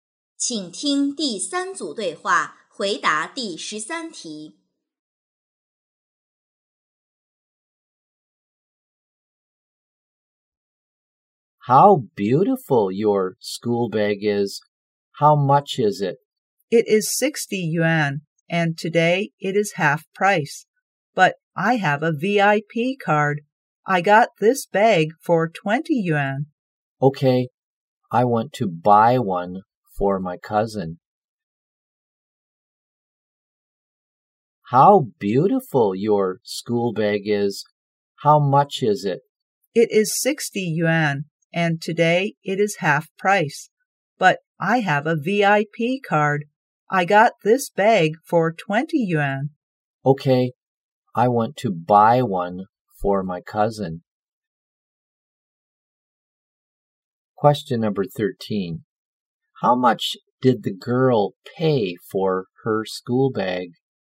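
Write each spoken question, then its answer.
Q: How much did the girl pay for her school bag?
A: 20 yuan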